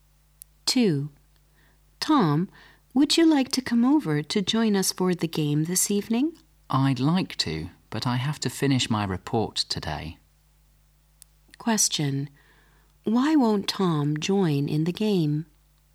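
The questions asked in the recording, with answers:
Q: Why won't Tom join in the game?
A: He has to finish his report today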